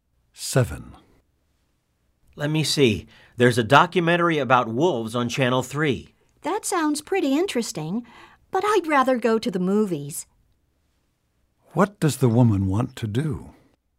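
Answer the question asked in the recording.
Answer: Go to the movies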